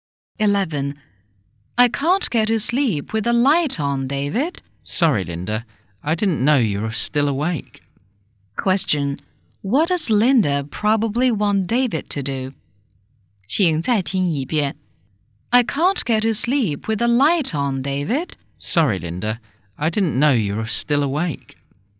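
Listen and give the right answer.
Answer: Turn off the light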